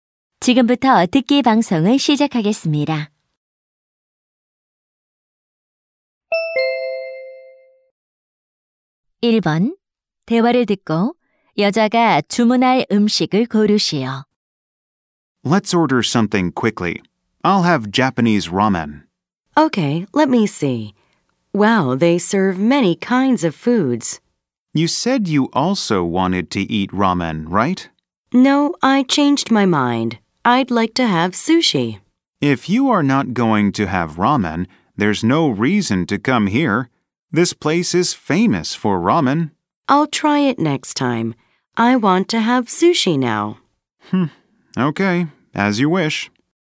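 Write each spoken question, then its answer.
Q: 대화를 듣고 여자가 주문할 음식을 고르시오.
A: 초밥(sushi)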